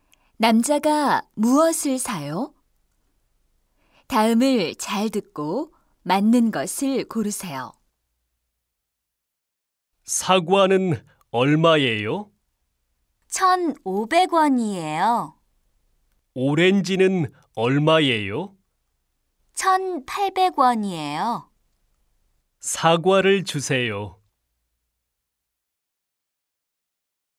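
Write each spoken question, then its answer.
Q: 남자가 무엇을 사요?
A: 사과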